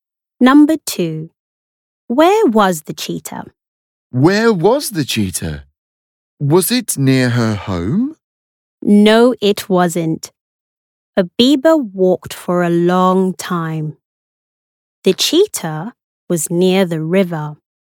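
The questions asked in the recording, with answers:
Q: Where was the cheetah?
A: Near the river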